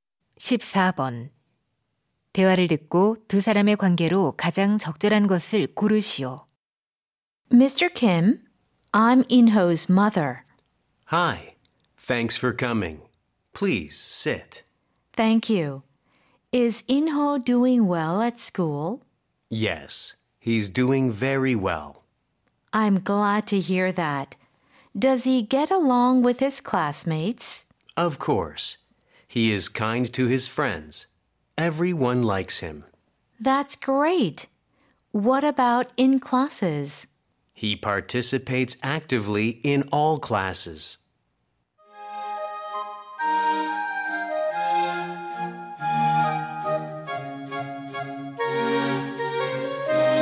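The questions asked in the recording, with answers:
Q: 대화를 듣고 두 사람의 관계로 가장 적절한 것을 고르시오.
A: 교사와 학부모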